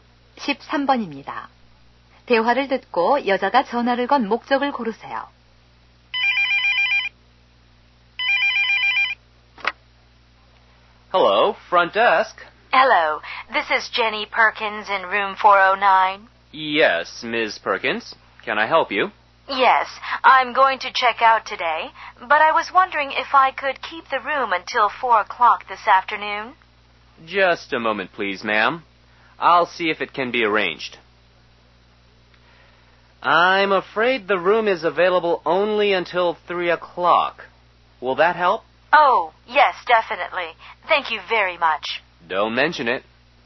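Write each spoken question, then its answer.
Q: 대화를 듣고 여자가 전화를 건 목적을 고르세요.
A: 퇴실 시간 연장 요청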